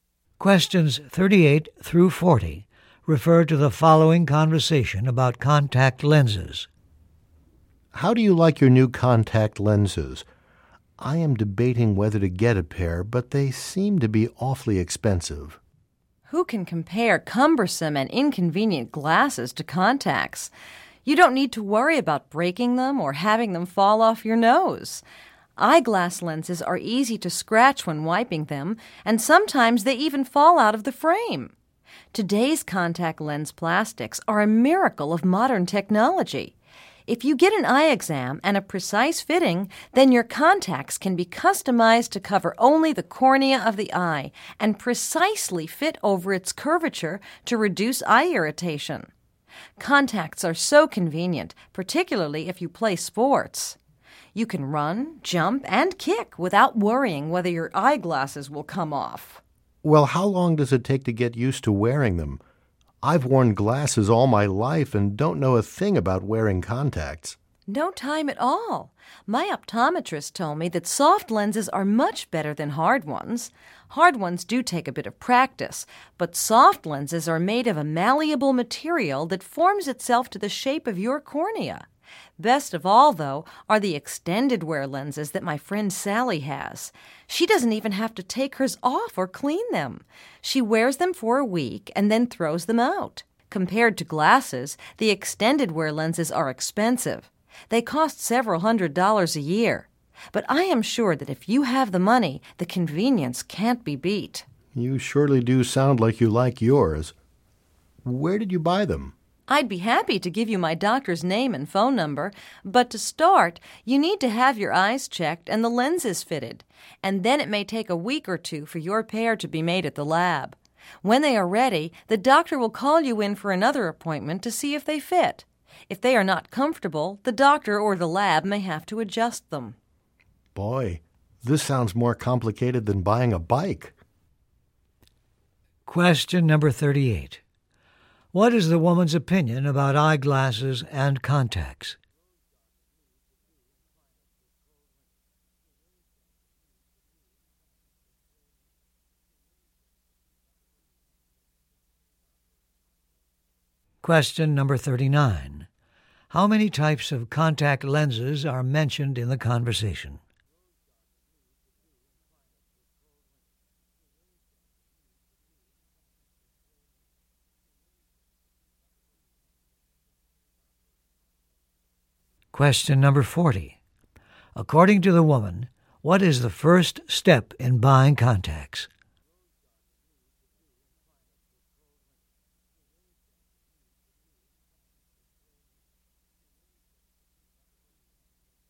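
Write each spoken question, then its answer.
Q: What is the woman's opinion about eyeglasses and contacts?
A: Contacts are much better and more convenient than glasses

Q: How many types of contact lenses are mentioned in the conversation?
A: Three (hard, soft and extended wear)

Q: According to the woman, what is the first step in buying contacts?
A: Having your eyes checked and the lenses fitted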